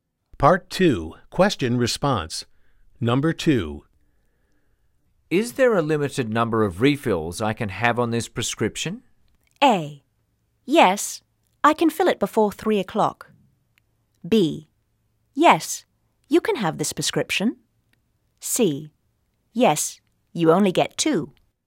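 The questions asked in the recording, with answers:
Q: Is there a limited number of refills I can have on this prescription?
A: C: Yes, you only get 2.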